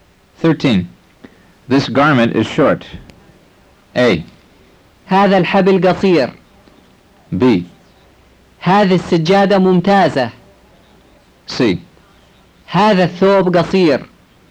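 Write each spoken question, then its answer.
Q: This garment is short.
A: C: هذا الثوب قصير.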